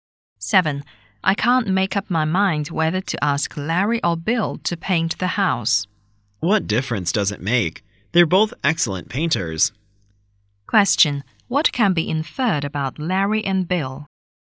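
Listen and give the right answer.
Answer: They are both excellent painters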